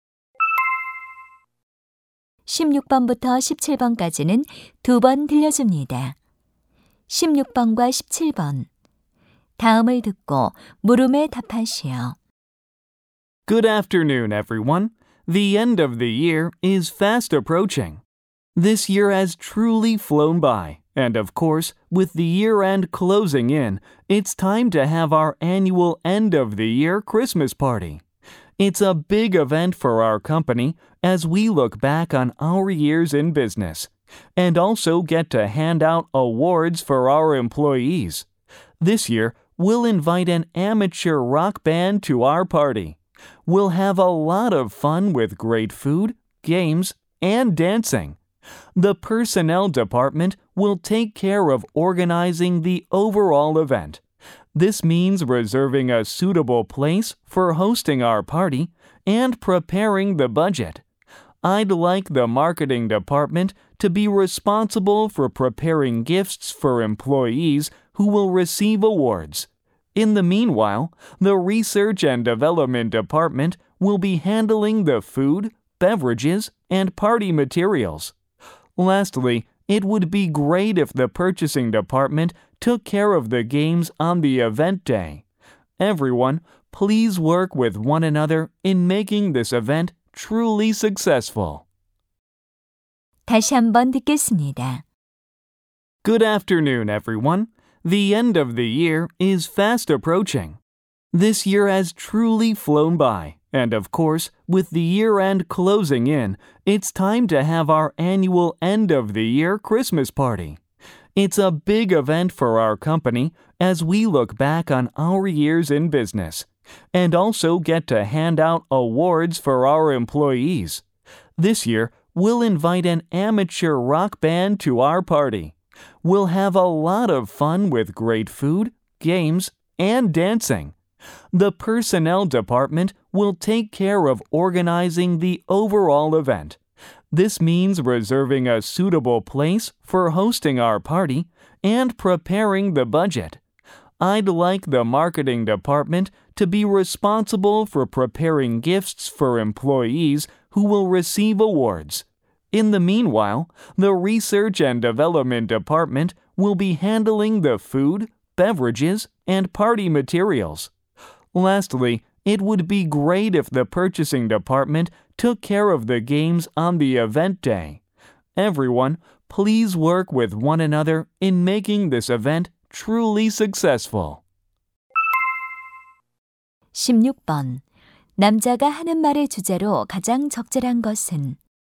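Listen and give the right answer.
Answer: 연말 파티 준비를 위한 부서별 업무 분담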